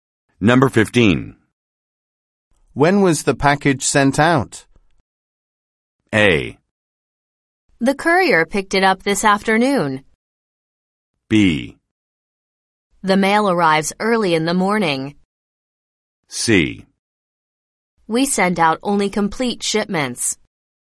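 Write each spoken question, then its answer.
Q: When was the package sent out?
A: A: The courier picked it up this afternoon.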